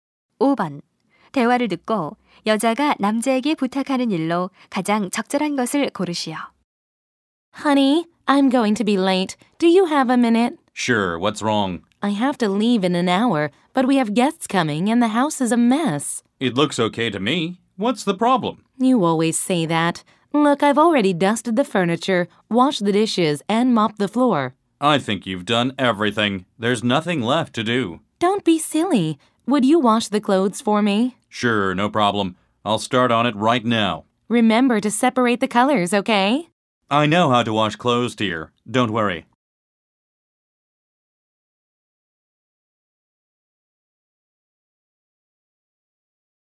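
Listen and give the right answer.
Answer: 빨래하기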